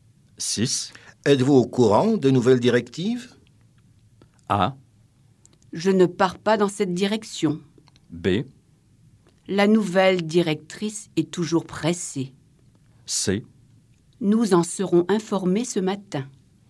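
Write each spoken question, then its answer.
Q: Êtes-vous au courant des nouvelles directives?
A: C: Nous en serons informés ce matin.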